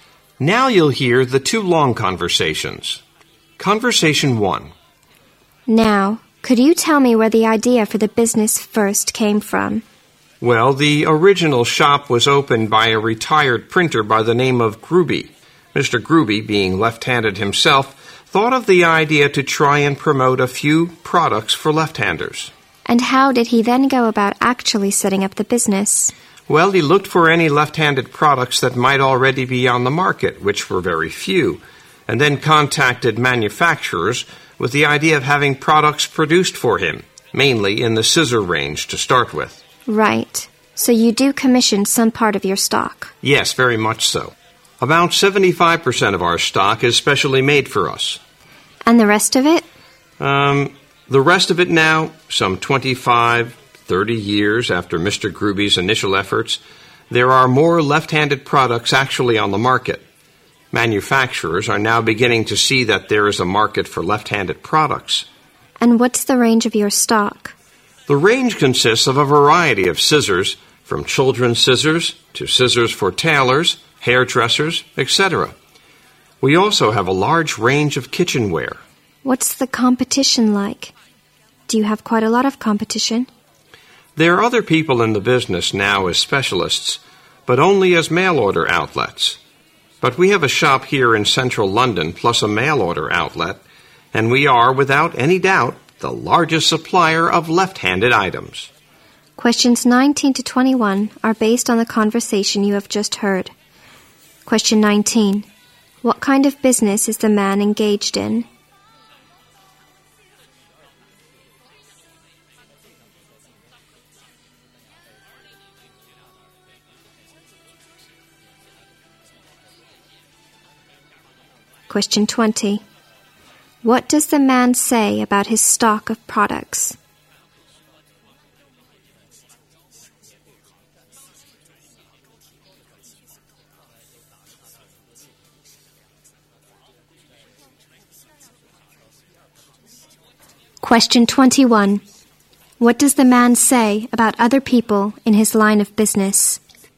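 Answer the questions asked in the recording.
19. Selling products for left-handed people.
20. About 75% of it is specially made for them.
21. They only sell by mail order.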